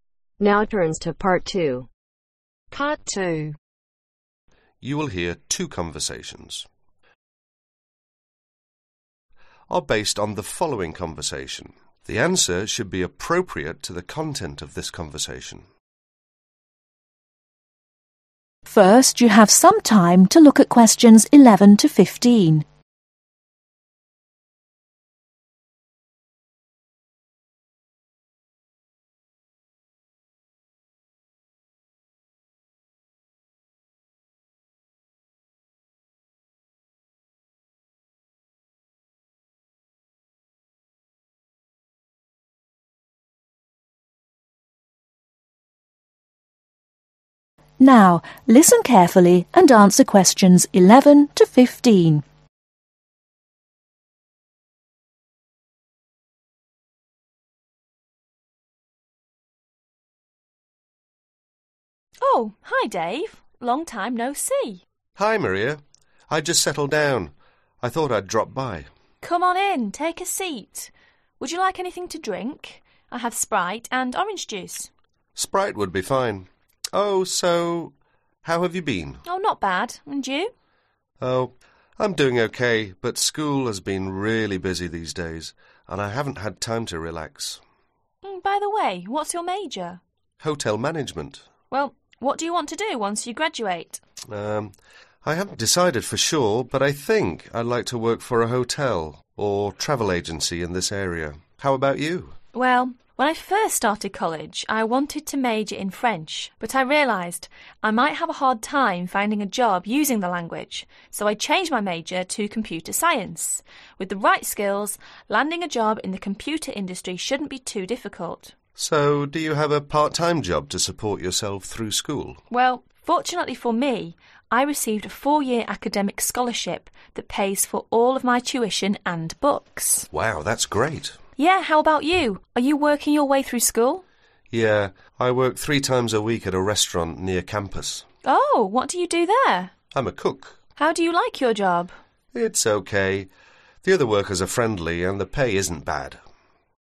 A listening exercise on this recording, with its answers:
Write the correct letters, A-C next to questions 11-15.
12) The women majors in French ..........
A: If the Information in the statement is Inaccurate

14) The man has a part-time job as a waiter at a restaurant ..........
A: If the Information in the statement is Inaccurate

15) The man's part-time job is not very busy ..........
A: If the Information in the statement is Not Given